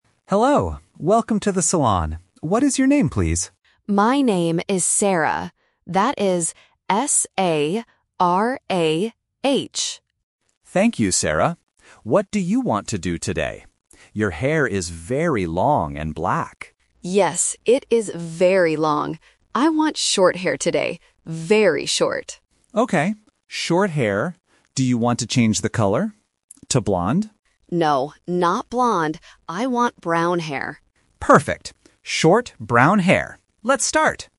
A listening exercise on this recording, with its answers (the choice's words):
Listen to the conversation and choose the correct answer (A, B, or C).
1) How do you spell the customer's name?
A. S-A-R-A-H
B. S-E-R-A-H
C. Z-A-R-A-H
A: S-A-R-A-H

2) What does the customer want to do with her hair?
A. Keep it long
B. Cut it short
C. Wash it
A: Cut it short

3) What color does the customer want?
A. Black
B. Blond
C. Brown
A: Brown

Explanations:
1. The customer spells her name out loud: "S-A-R-A-H." Why the trap is wrong: Option (B) S-E-R-A-H is a phonetic trap because the letter "A" in English is pronounced /eɪ/, which A1 learners often confuse with the letter "E". Option (C) Z-A-R-A-H is a similar-sounding name but starts with a Z.
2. The customer clearly says, "I want short hair today. Very short." Why the trap is wrong: Option (A) Keep it long is a trap. The hairdresser mentions that her hair is currently "very long", but the customer wants to change it. Option (C) Wash it is a normal activity at a salon but is not mentioned in the audio.
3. The customer says, "I want brown hair." Why the trap is wrong: Option (A) Black is a trap because it is her current hair color. Option (B) Blond is also a trap; the hairdresser asks if she wants blond hair, but she says "No, not blond."

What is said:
Hairdresser: Hello! Welcome to the salon. What is your name, please?
Customer: My name is Sarah. That is S-A-R-A-H.
Hairdresser: Thank you, Sarah. What do you want to do today? Your hair is very long and black.
Customer: Yes, it is very long. I want short hair today. Very short.
Hairdresser: Okay. Short hair. Do you want to change the color? To blond?